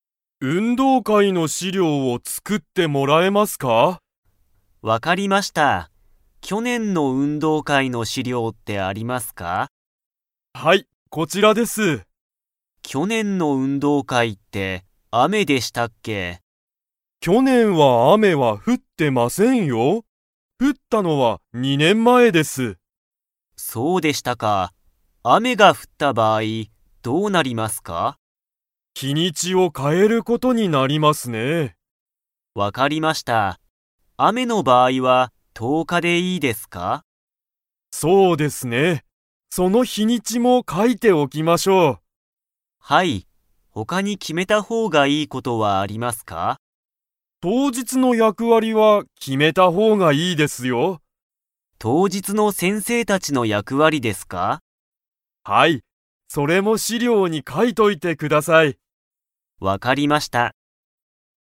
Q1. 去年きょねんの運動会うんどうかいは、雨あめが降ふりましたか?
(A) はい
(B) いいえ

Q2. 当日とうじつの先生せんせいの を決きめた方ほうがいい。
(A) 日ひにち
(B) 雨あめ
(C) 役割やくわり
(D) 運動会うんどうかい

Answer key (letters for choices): 1B, 2C

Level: Level 4